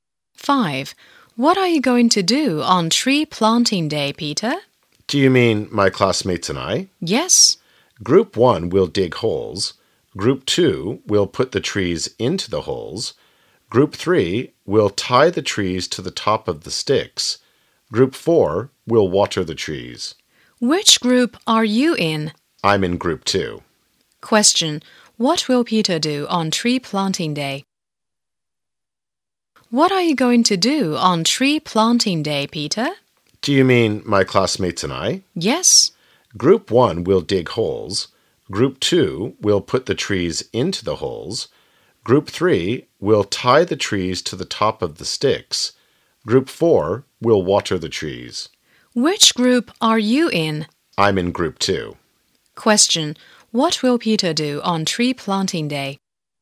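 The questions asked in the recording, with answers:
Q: What will Peter do on tree planting day?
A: Put the trees into the holes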